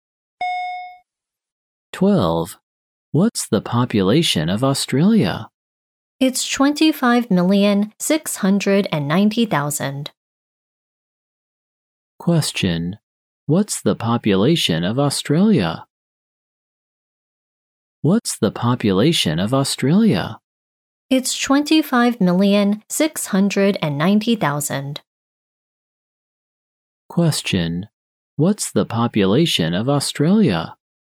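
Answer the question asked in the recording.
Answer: 25,690,000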